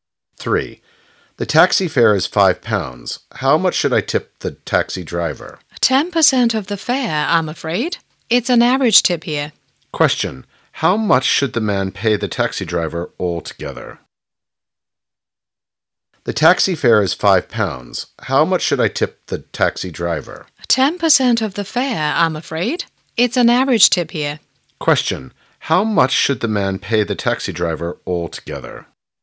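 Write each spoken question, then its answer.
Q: How much should the man pay the taxi driver altogether?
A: £5.50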